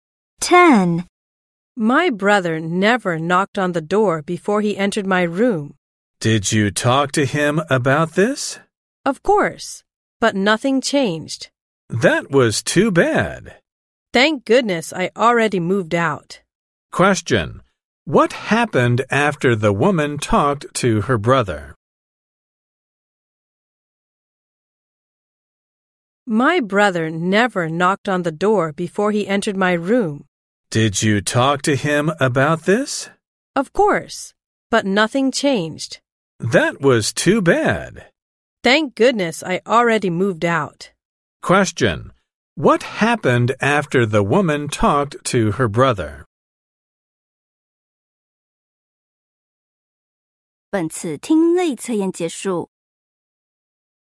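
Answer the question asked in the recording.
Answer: Nothing changed; he still didn't knock before entering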